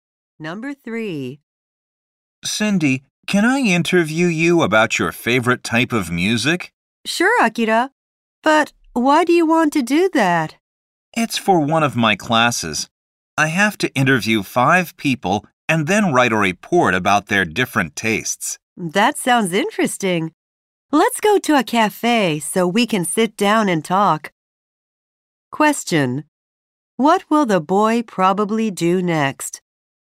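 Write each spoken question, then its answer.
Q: What will the boy probably do next?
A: Go to a cafe to interview Cindy.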